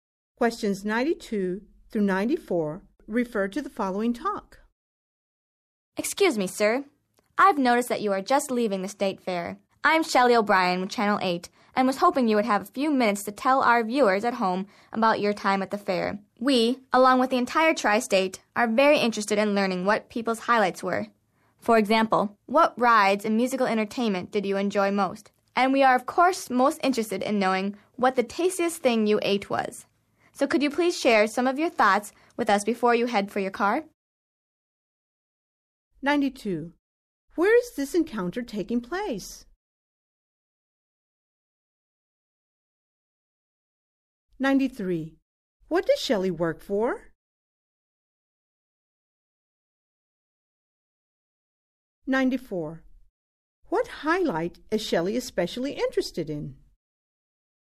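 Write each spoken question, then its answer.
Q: Where is this encounter taking place?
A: At the State Fair

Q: What does Shelley work for?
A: Channel 8

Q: What highlight is Shelley especially interested in?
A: The tastiest thing people ate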